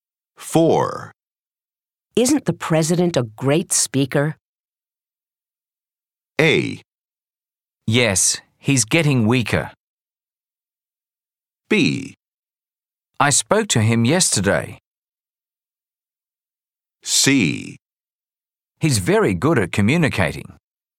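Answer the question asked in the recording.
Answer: C: He's very good at communicating.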